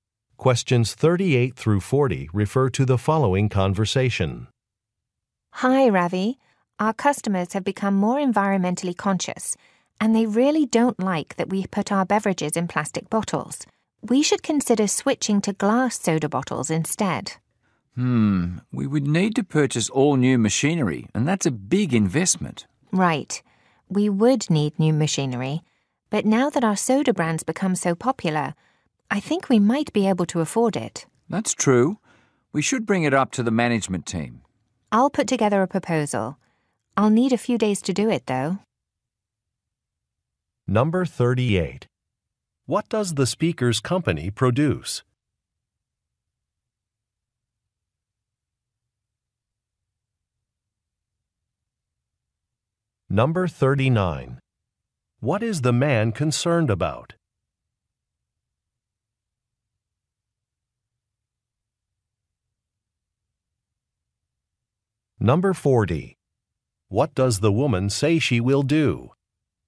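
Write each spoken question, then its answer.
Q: What does the speaker's company produce?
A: Soda (beverages).

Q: What is the man concerned about?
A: The cost of new machinery.

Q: What does the woman say she will do?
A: Put together a proposal.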